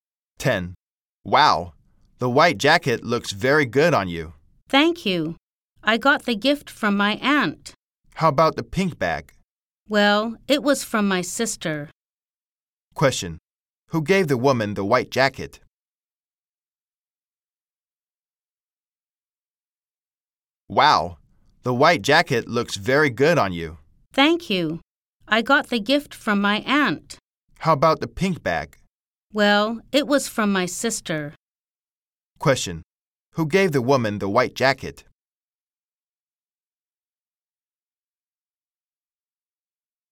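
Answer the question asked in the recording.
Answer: Her aunt.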